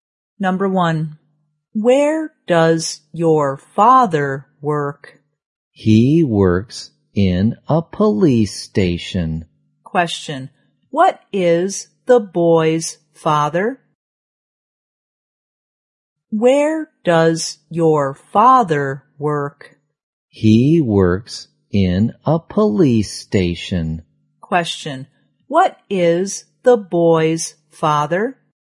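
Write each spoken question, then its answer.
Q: Question, what is the boy's father?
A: A policeman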